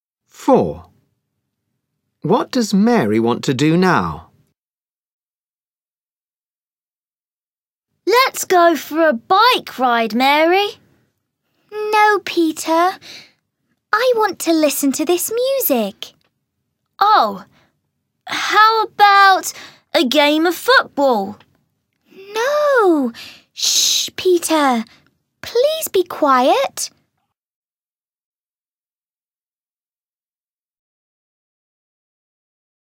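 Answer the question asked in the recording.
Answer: Listen to this music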